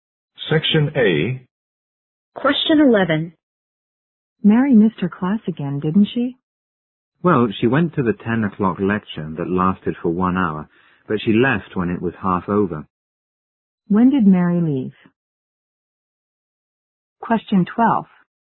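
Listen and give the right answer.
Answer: At 10:30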